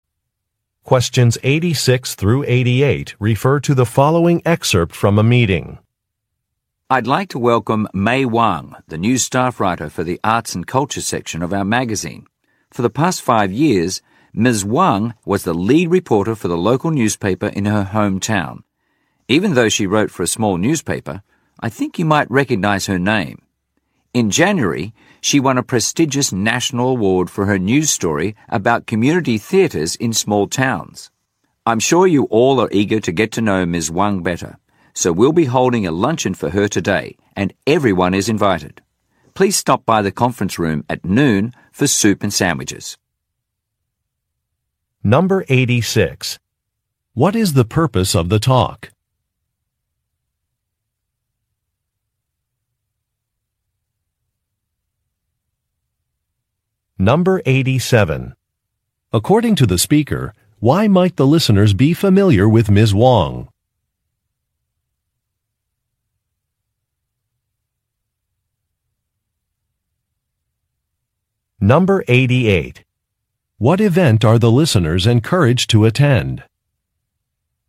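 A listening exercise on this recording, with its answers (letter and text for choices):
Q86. What is the purpose of the talk?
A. To thank project volunteers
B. To explain an event schedule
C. To introduce a new employee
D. To welcome a guest speaker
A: C. To introduce a new employee

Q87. According to the speaker, why might the listeners be familiar with Ms. Wang?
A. She starred in a television show.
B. She won a journalism award.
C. She used to be an intern at the company.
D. She has relatives who work for the company.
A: B. She won a journalism award.

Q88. What event are the listeners encouraged to attend?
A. A board meeting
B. A theater performance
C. A training session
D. A staff luncheon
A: D. A staff luncheon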